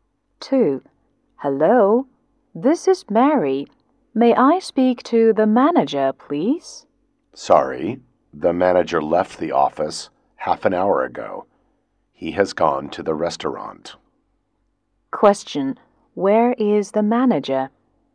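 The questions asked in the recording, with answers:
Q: Where is the manager?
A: At the restaurant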